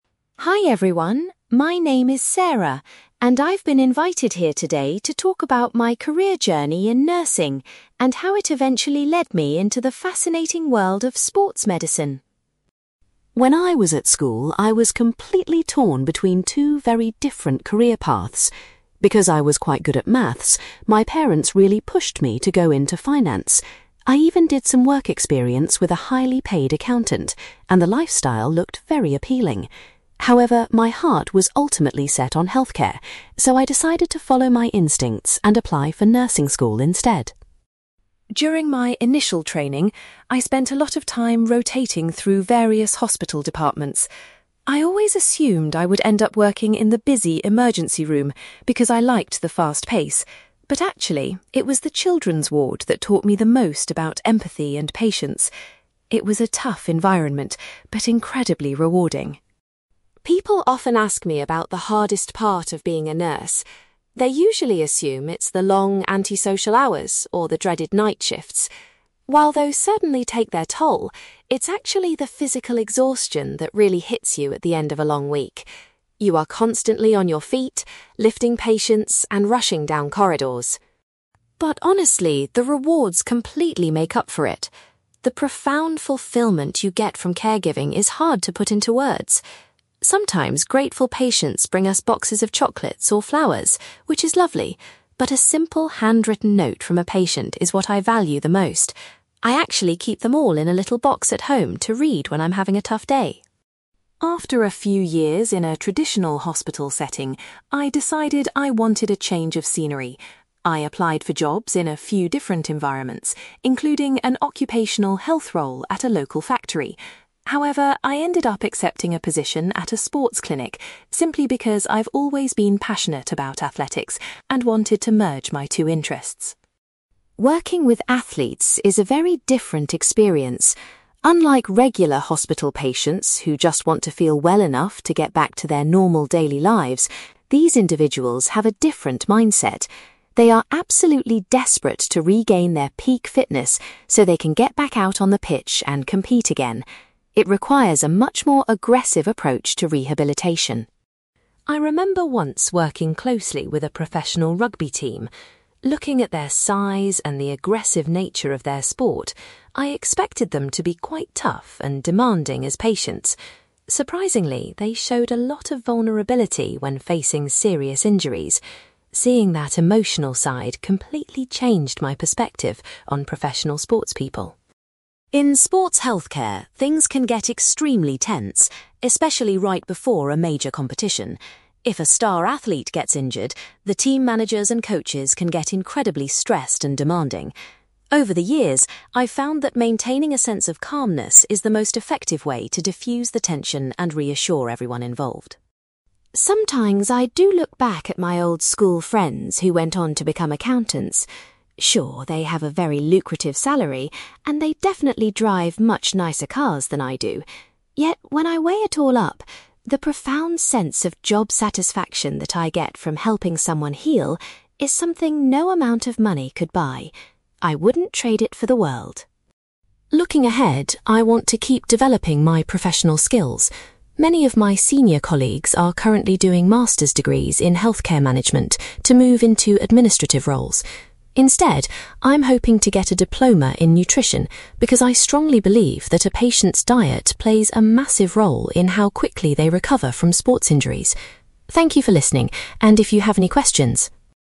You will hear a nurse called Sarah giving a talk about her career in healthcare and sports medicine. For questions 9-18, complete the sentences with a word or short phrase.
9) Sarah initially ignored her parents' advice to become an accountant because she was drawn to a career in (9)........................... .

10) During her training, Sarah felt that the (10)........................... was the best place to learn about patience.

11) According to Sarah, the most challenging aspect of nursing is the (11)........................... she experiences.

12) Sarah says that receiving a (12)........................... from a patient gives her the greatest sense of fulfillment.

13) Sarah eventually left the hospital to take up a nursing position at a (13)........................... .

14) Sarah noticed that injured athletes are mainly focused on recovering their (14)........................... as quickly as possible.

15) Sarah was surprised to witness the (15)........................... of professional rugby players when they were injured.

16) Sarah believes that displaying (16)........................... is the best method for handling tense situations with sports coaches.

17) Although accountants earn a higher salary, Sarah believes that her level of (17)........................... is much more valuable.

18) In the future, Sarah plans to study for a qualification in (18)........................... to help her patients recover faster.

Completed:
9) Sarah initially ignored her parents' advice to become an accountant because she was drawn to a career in healthcare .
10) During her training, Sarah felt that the children's ward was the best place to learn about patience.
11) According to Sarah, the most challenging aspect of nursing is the physical exhaustion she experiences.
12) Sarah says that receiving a handwritten note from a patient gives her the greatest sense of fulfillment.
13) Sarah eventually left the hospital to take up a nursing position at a sports clinic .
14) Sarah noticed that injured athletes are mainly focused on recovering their peak fitness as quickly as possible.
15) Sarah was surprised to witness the vulnerability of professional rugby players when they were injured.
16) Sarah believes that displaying calmness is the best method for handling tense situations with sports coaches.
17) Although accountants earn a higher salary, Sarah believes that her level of job satisfaction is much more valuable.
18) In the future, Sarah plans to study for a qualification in nutrition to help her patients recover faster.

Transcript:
Sarah: Hi everyone, my name is Sarah, and I've been invited here today to talk about my career journey in nursing, and how it eventually led me into the fascinating world of sports medicine.
When I was at school, I was completely torn between two very different career paths. Because I was quite good at maths, my parents really pushed me to go into finance. I even did some work experience with a highly paid accountant, and the lifestyle looked very appealing. However, my heart was ultimately set on healthcare, so I decided to follow my instincts and apply for nursing school instead.
During my initial training, I spent a lot of time rotating through various hospital departments. I always assumed I would end up working in the busy emergency room because I liked the fast pace. But actually, it was the children's ward that taught me the most about empathy and patience. It was a tough environment, but incredibly rewarding.
People often ask me about the hardest part of being a nurse. They usually assume it's the long, antisocial hours or the dreaded night shifts. While those certainly take their toll, it's actually the physical exhaustion that really hits you at the end of a long week. You are constantly on your feet, lifting patients, and rushing down corridors.
But honestly, the rewards completely make up for it. The profound fulfillment you get from caregiving is hard to put into words. Sometimes grateful patients bring us boxes of chocolates or flowers, which is lovely, but a simple handwritten note from a patient is what I value the most. I actually keep them all in a little box at home to read when I'm having a tough day.
After a few years in a traditional hospital setting, I decided I wanted a change of scenery. I applied for jobs in a few different environments, including an occupational health role at a local factory. However, I ended up accepting a position at a sports clinic, simply because I've always been passionate about athletics and wanted to merge my two interests.
Working with athletes is a very different experience. Unlike regular hospital patients who just want to feel well enough to get back to their normal daily lives, these individuals have a different mindset. They are absolutely desperate to regain their peak fitness so they can get back out on the pitch and compete again. It requires a much more aggressive approach to rehabilitation.
I remember once working closely with a professional rugby team. Looking at their size and the aggressive nature of their sport, I expected them to be quite tough and demanding as patients. Surprisingly, they showed a lot of vulnerability when facing serious injuries. Seeing that emotional side completely changed my perspective on professional sportspeople.
In sports healthcare, things can get extremely tense, especially right before a major competition. If a star athlete gets injured, the team managers and coaches can get incredibly stressed and demanding. Over the years, I've found that maintaining a sense of calmness is the most effective way to diffuse the tension and reassure everyone involved.
Sometimes I do look back at my old school friends who went on to become accountants. Sure, they have a very lucrative salary, and they definitely drive much nicer cars than I do. Yet, when I weigh it all up, the profound sense of job satisfaction that I get from helping someone heal is something no amount of money could buy. I wouldn't trade it for the world.
Looking ahead, I want to keep developing my professional skills. Many of my senior colleagues are currently doing master's degrees in healthcare management to move into administrative roles. Instead, I'm hoping to get a diploma in nutrition, because I strongly believe that a patient's diet plays a massive role in how quickly they recover from sports injuries. Thank you for listening, and if you have any questions...

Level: B2